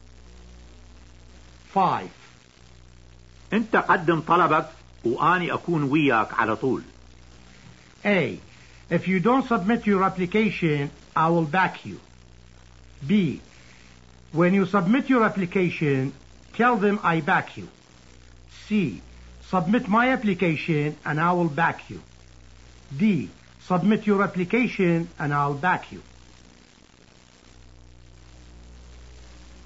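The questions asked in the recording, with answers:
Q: انت قدم طلبك واني اكون وياك على طول.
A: D: Submit your application and I'll back you.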